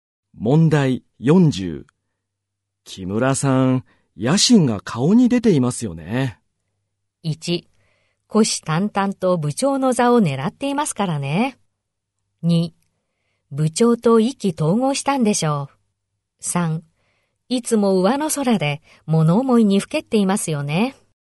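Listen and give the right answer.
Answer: 1: 虎視眈々と部長の座を狙っていますからね。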